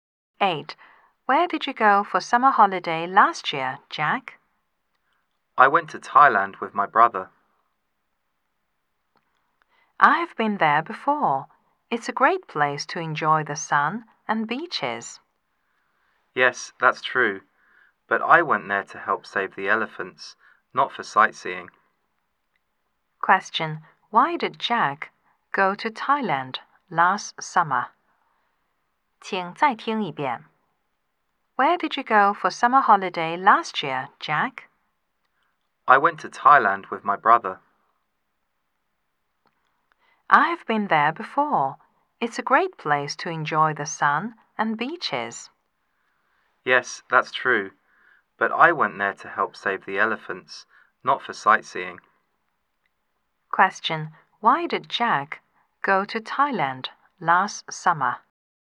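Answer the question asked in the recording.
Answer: To help save the elephants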